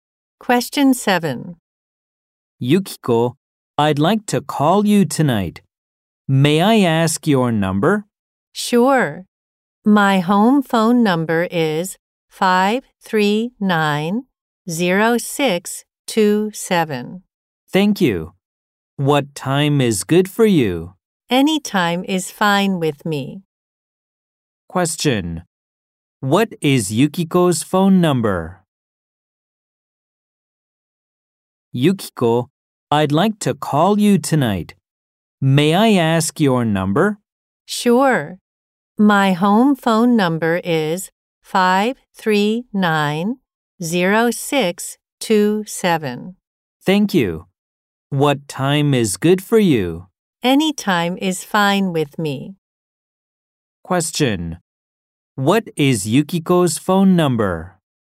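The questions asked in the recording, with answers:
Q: What is Yukiko's phone number?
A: 539-0627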